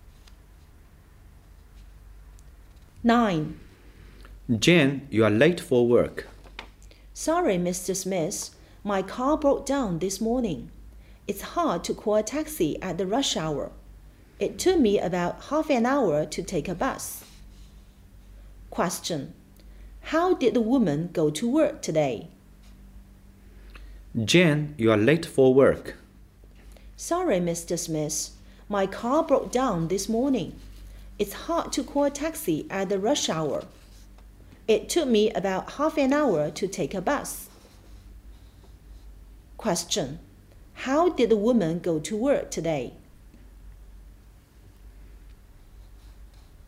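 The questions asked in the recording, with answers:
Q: How did the woman go to work today?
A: By bus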